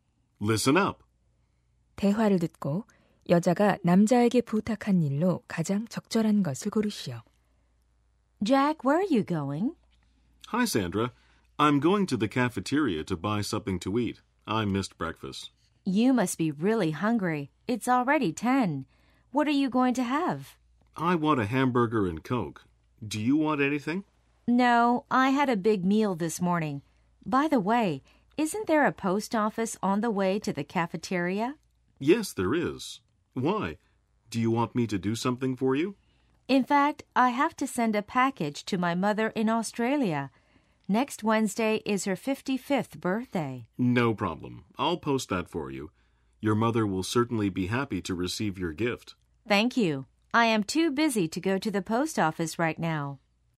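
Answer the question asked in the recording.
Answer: 소포 부치기 (호주에 계신 어머니께 우체국에서 소포 보내기)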